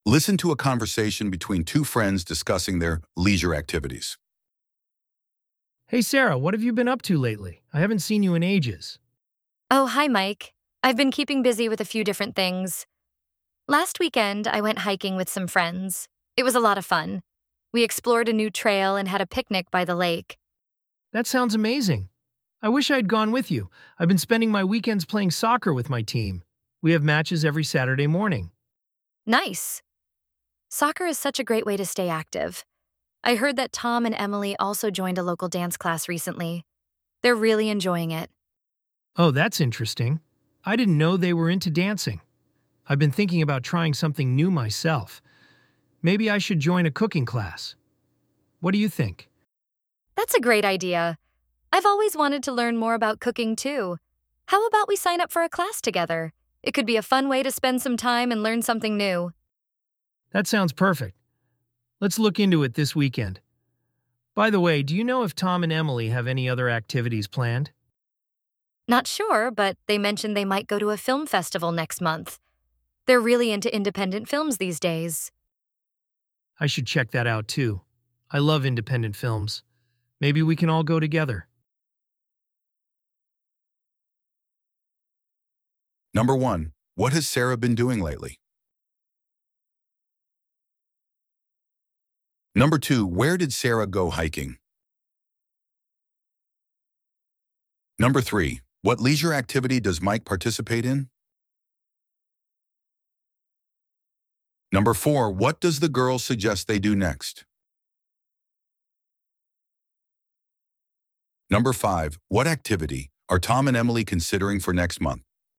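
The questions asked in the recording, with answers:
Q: what has Sarah been doing lately?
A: Keeping busy with different things, like going hiking with friends

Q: what leisure activity does Mike participate in?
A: Playing soccer with his team

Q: what activity are Tom and Emily considering for next month?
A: Going to a film festival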